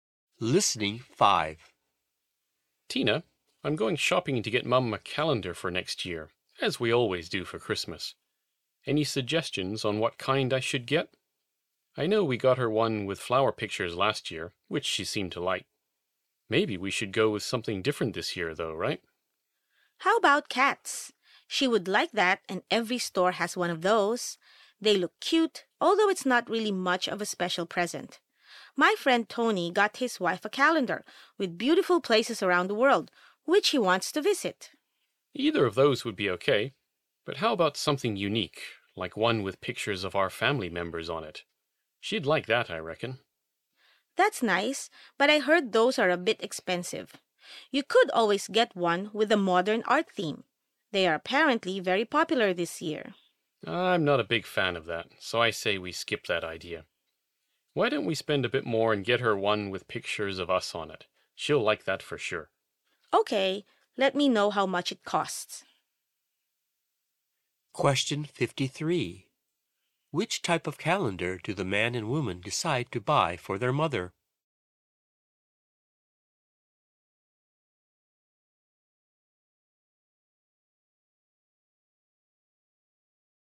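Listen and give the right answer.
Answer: One with pictures of their family members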